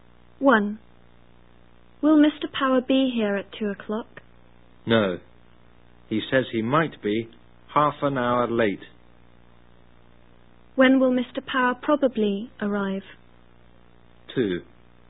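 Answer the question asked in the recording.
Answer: At 2:30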